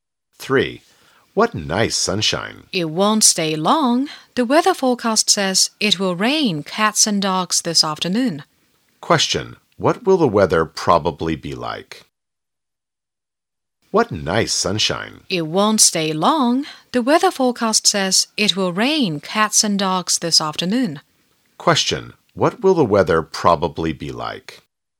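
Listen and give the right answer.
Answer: It will rain heavily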